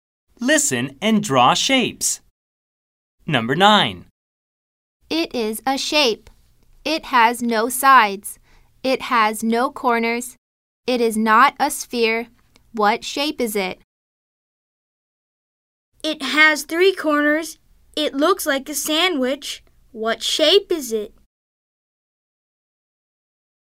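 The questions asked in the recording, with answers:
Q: What shape is it?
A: a circle

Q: It has 3 corners. It looks like a sandwich. What shape is it?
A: a triangle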